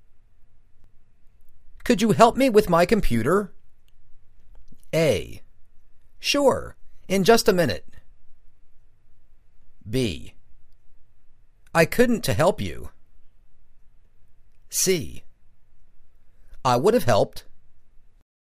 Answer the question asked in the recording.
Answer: Sure, in just a minute.